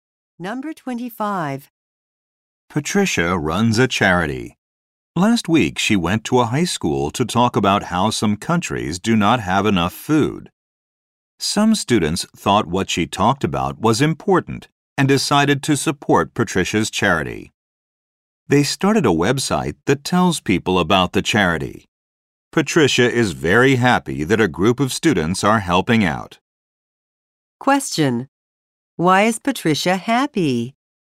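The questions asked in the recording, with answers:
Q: Why is Patricia happy?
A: Students are helping her charity with a website.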